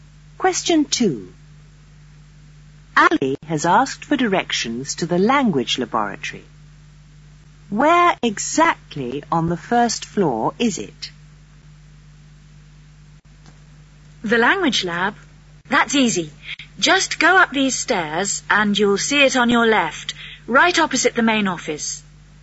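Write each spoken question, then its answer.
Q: Where exactly on the first floor is it?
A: On the left, opposite the main office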